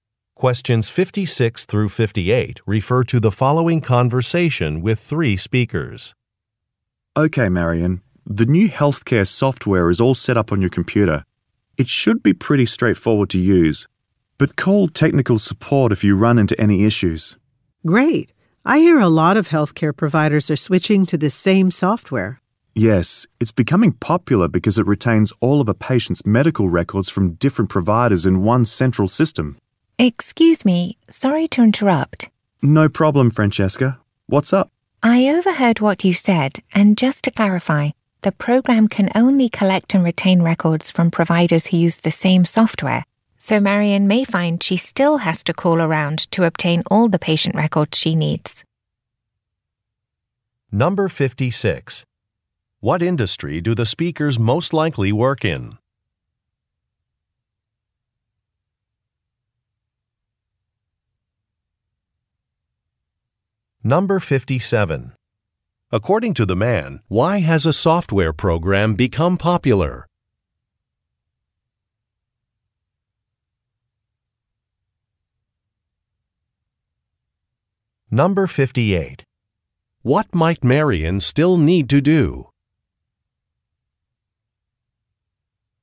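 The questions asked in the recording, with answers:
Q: What industry do the speakers most likely work in?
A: Healthcare

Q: According to the man, why has a software program become popular?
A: It keeps patients' records from different providers in one central system

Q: What might Marion still need to do?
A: Call around to get patient records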